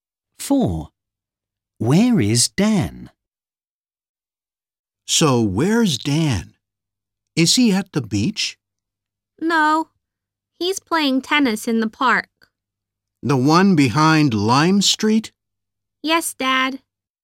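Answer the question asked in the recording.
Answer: playing tennis in the park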